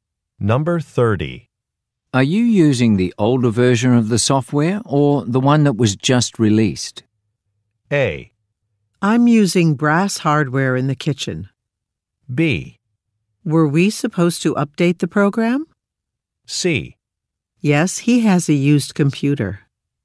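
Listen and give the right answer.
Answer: B: Were we supposed to update the program?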